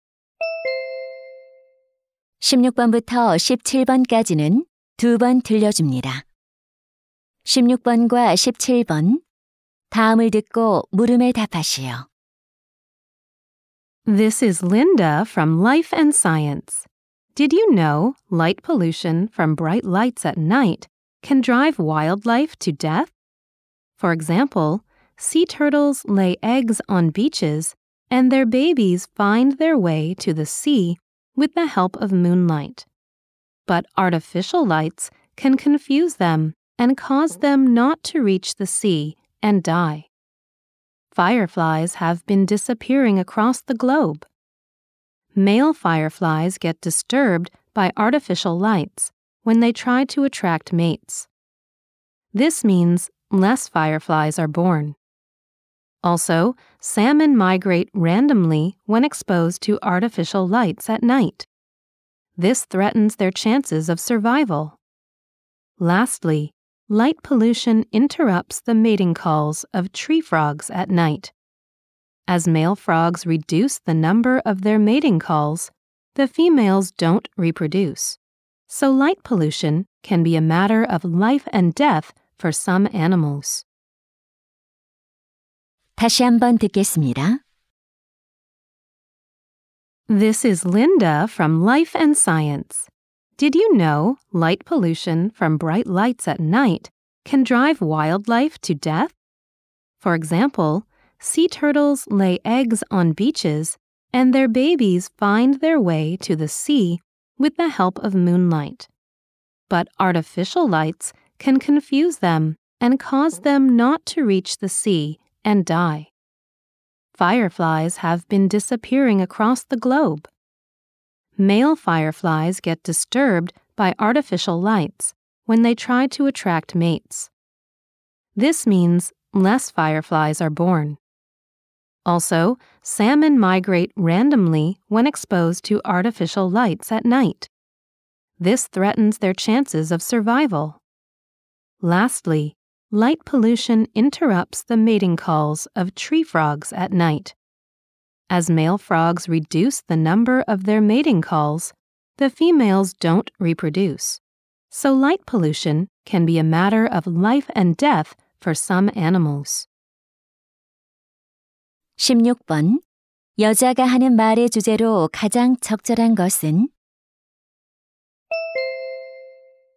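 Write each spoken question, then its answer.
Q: 여자가 하는 말의 주제로 가장 적절한 것은?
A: 빛 공해가 야생 동물에 미치는 악영향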